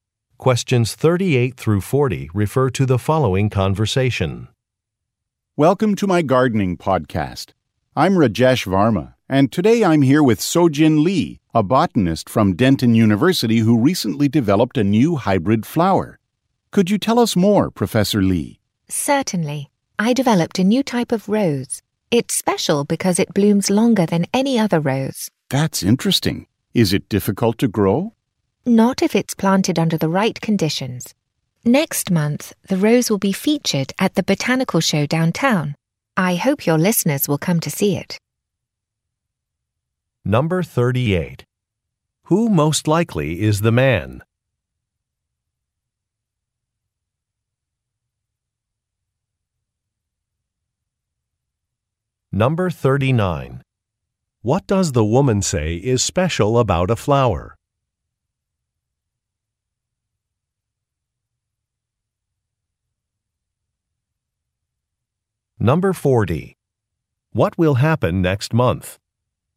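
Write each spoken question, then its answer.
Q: Who most likely is the man?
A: A podcast host

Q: What does the woman say is special about a flower?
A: It blooms longer than any other rose

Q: What will happen next month?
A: The rose will be featured at a botanical show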